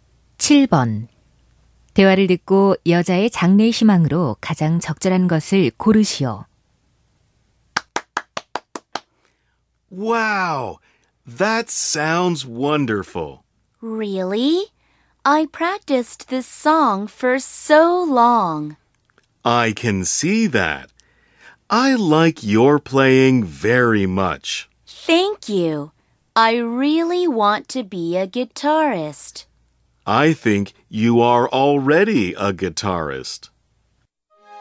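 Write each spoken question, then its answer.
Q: 대화를 듣고 여자의 장래 희망으로 가장 적절한 것을 고르시오.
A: 기타리스트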